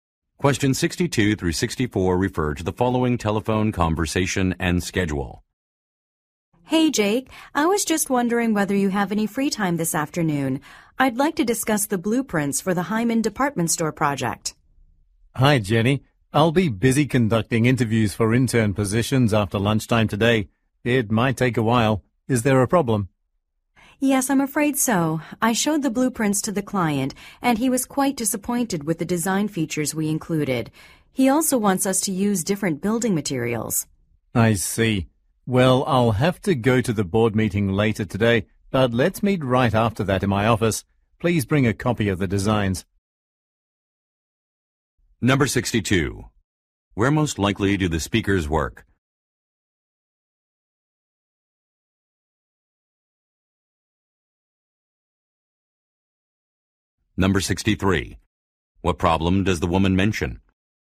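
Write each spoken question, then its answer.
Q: What problem does the woman mention?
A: The client was disappointed with the design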